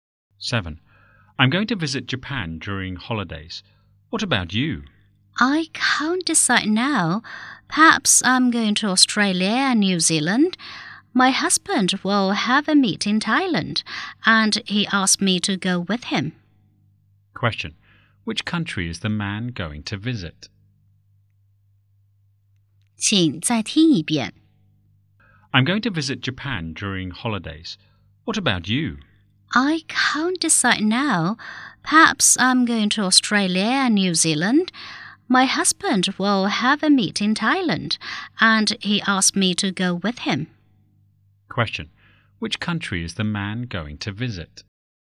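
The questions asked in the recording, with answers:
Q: Which country is the man going to visit?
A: Japan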